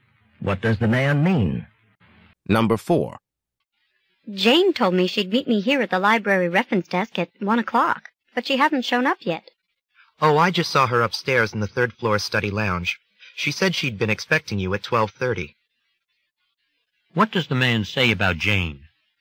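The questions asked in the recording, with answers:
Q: What does the man say about Jane?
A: She is in the third-floor study lounge; she thought they were meeting at 12:30.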